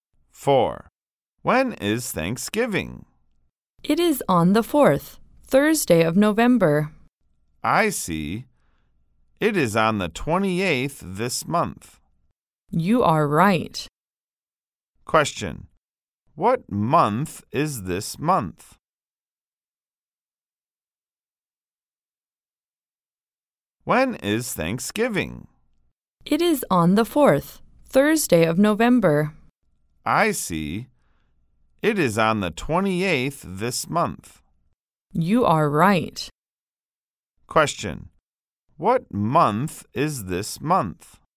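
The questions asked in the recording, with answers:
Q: What month is this month?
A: November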